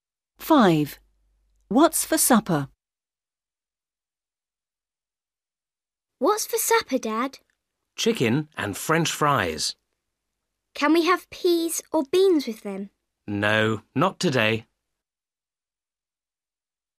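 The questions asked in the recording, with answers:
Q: What's for supper?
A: chicken and French fries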